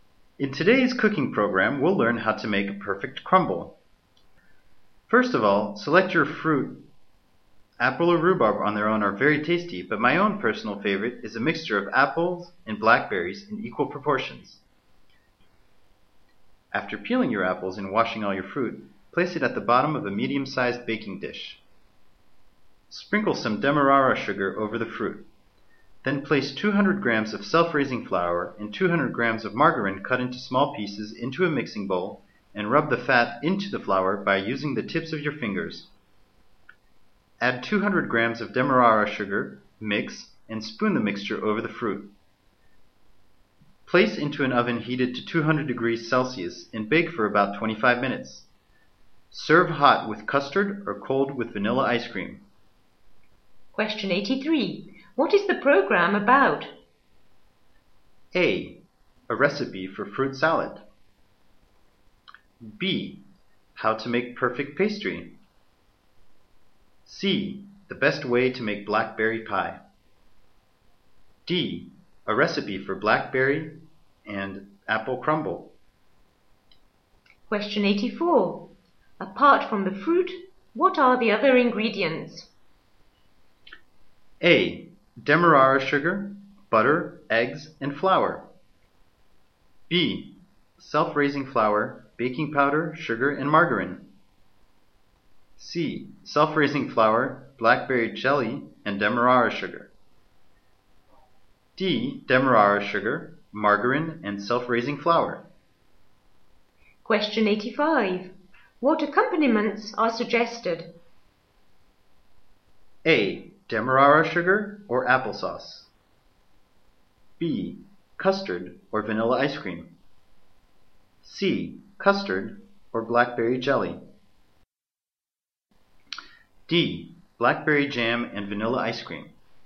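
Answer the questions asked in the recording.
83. D: A recipe for blackberry and apple crumble.
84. D: Demerara sugar, margarine, and self-raising flour.
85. B: Custard or vanilla ice cream.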